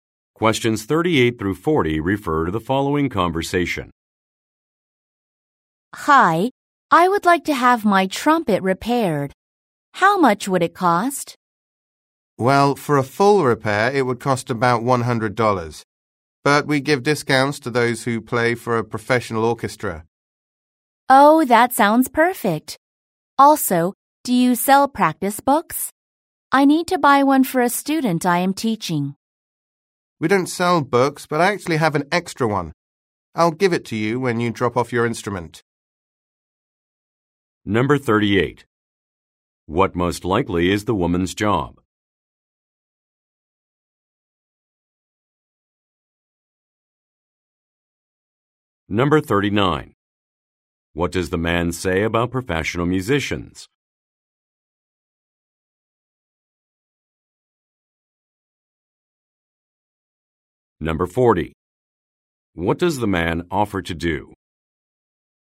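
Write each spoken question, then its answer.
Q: What does the man say about professional musicians?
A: They get discounts

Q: What does the man offer to do?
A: Give her an extra practice book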